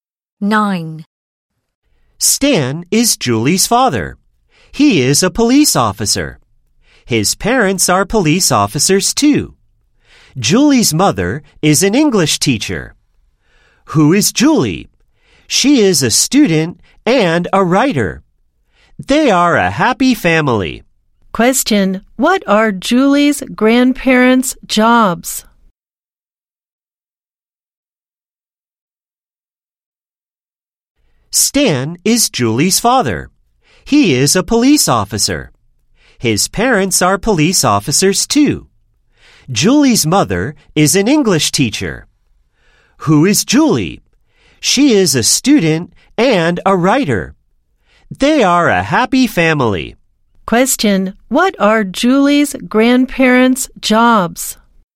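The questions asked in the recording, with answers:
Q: Question, what are Julie's grandparents' jobs?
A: They are police officers.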